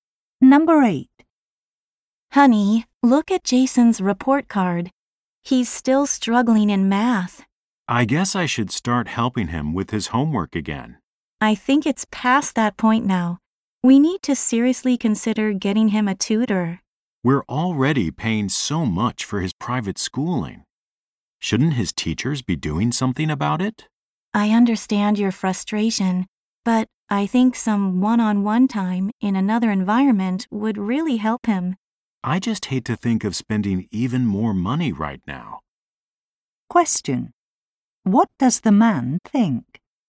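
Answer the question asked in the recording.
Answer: He doesn't want to spend more money on a tutor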